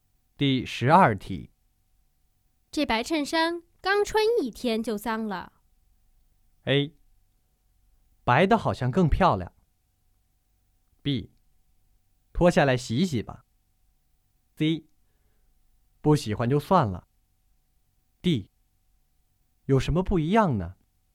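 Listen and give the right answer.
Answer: B: 脱下来洗洗吧。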